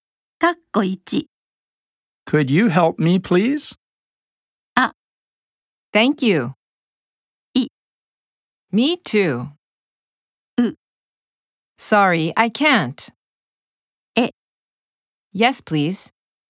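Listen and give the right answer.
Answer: う: Sorry, I can't.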